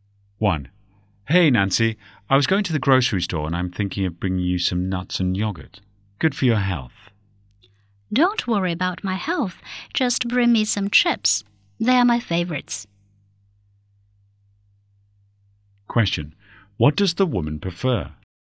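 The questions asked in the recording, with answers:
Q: What does the woman prefer?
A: Chips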